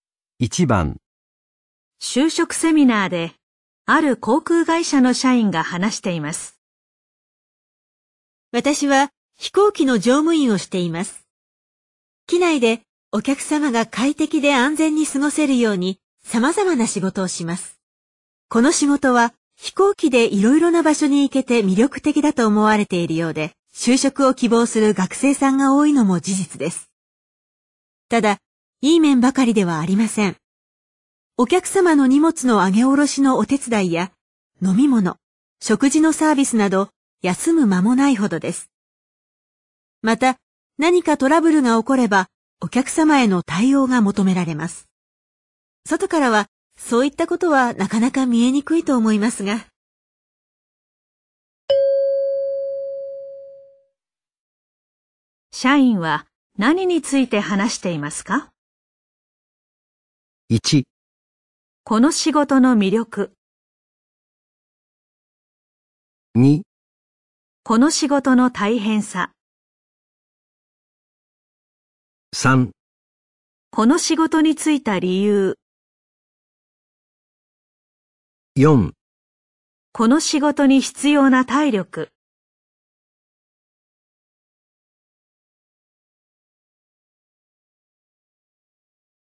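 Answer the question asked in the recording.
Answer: 2: この仕事の大変さ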